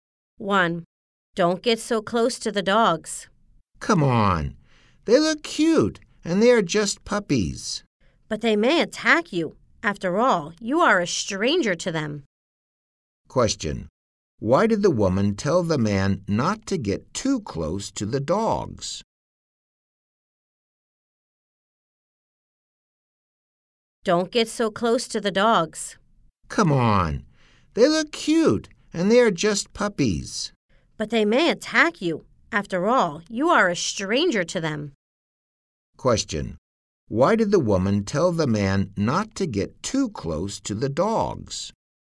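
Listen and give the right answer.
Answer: Because the dogs may attack him; he is a stranger to them.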